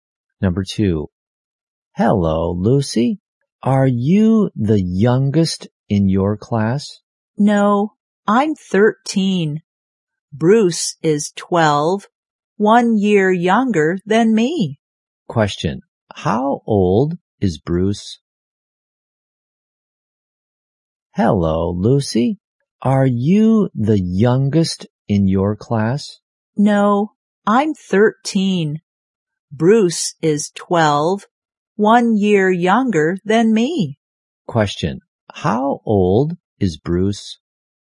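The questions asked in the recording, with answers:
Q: how old is Bruce?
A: 12.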